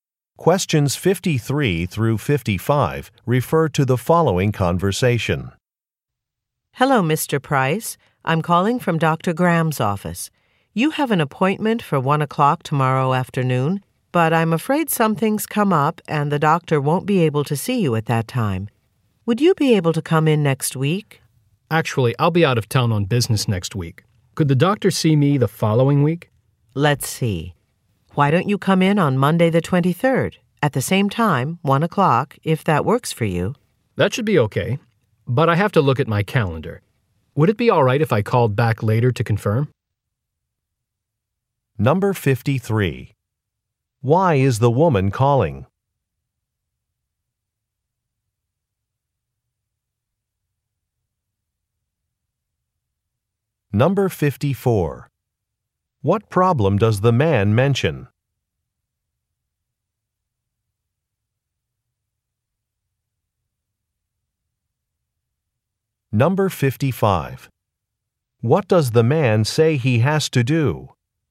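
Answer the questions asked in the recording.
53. To reschedule an appointment
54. He will be out of town on business next week
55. Check his calendar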